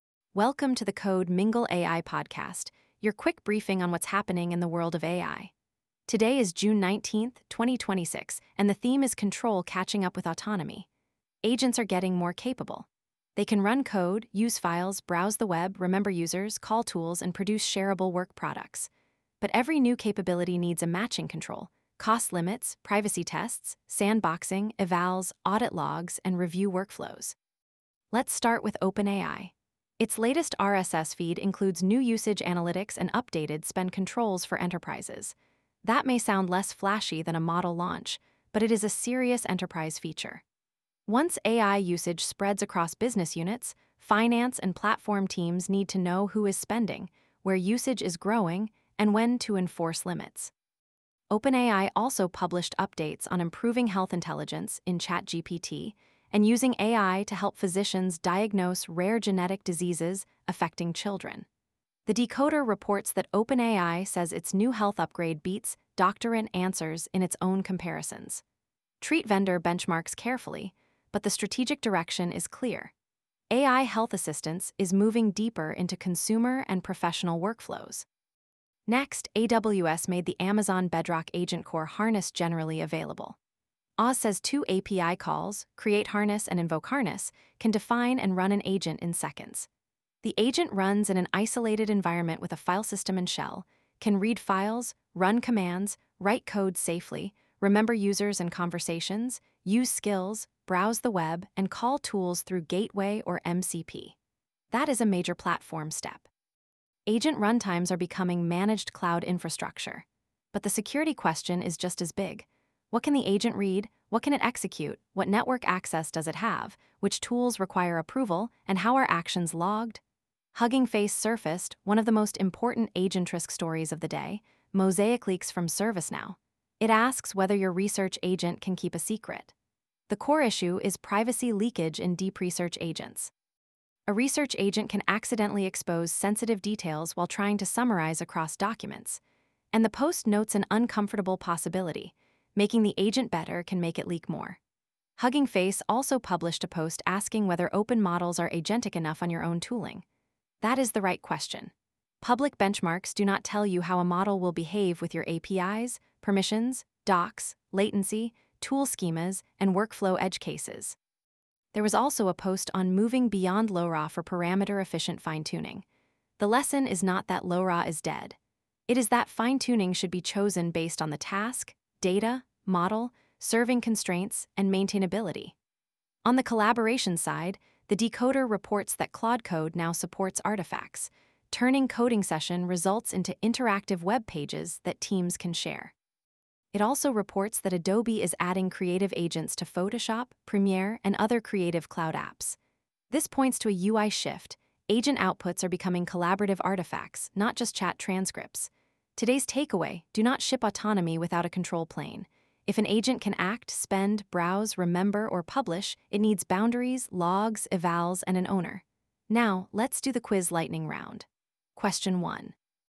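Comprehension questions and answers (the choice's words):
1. Why are OpenAI's enterprise usage analytics and spend controls significant?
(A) They show AI usage is becoming a governed enterprise cost center, not just a developer experiment.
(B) They remove all need for procurement teams.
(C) They only change the color of the ChatGPT interface.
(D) They make agent loops free to run forever.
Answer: They show AI usage is becoming a governed enterprise cost center, not just a developer experiment.

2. What makes Amazon Bedrock AgentCore harness a major agent-platform story?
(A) It provides a managed runtime for agents with isolated execution, memory, skills, web access, and tool calls.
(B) It prevents agents from ever using files or tools.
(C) It is only a static documentation page.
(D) It replaces all need for security controls.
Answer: It provides a managed runtime for agents with isolated execution, memory, skills, web access, and tool calls.

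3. What risk does MosaicLeaks focus on?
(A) Privacy leakage from deep-research agents that synthesize across sensitive sources.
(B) GPU fan noise in data centers.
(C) A CSS layout bug in dashboards.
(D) The inability of models to produce any text.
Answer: Privacy leakage from deep-research agents that synthesize across sensitive sources.

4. Why should teams benchmark open models on their own tooling?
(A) Agent performance depends on real tool schemas, permissions, docs, latency, and workflow edge cases.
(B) Public benchmarks perfectly predict every private workflow.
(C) Tool use has no effect on agent outcomes.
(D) Only closed models can call APIs.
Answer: Agent performance depends on real tool schemas, permissions, docs, latency, and workflow edge cases.

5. What is the key lesson from Claude Code artifacts and Adobe creative agents?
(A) Agent outputs are becoming collaborative artifacts that need provenance, permissions, review, and versioning.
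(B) Agents will only produce plain-text chat transcripts forever.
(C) Version history no longer matters.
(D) Creative and coding tools are unrelated to AI agents.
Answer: Agent outputs are becoming collaborative artifacts that need provenance, permissions, review, and versioning.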